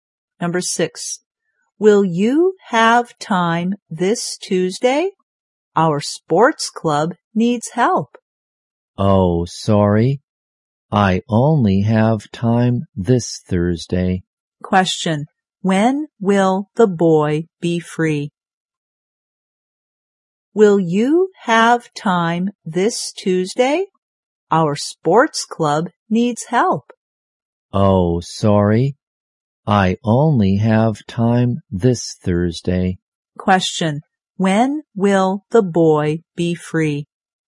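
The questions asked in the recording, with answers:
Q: when will the boy be free?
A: This Thursday.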